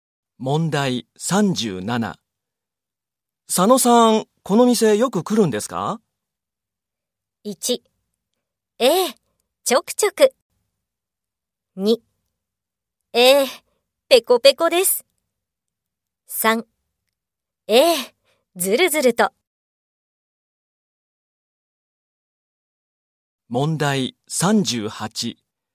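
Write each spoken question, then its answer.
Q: 佐野さん、この店よく来るんですか?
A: 1: ええ、ちょくちょく。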